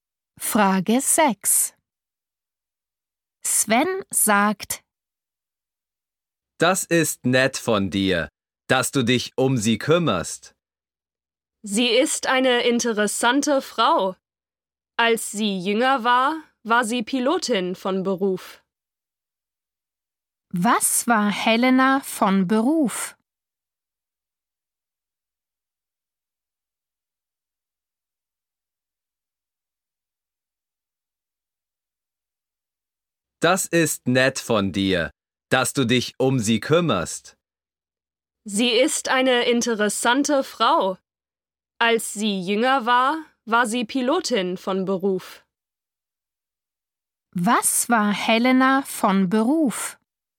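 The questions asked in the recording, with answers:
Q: Was war Helena von Beruf?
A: Pilotin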